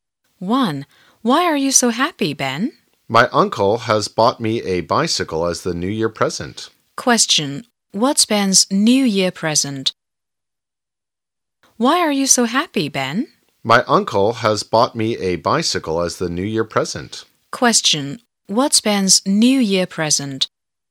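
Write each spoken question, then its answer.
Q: What's Ben's New Year present?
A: A bicycle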